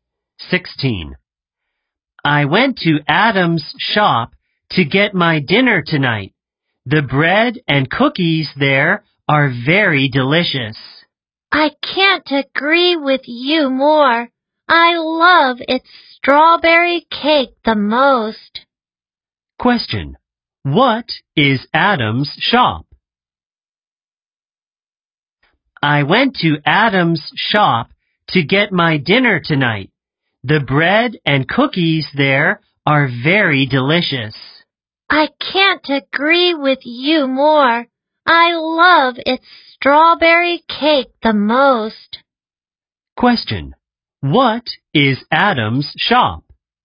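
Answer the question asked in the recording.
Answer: a bakery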